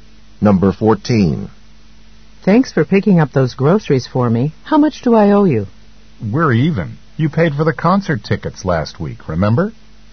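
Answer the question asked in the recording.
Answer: The woman owes him nothing because she paid for the concert tickets.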